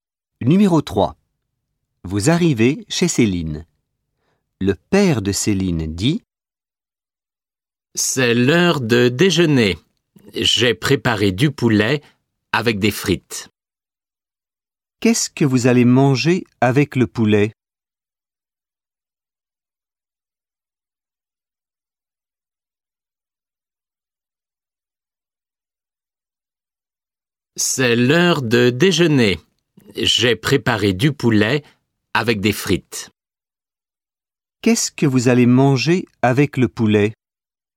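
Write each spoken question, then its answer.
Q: Qu'est-ce que vous allez manger avec le poulet ?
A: Des frites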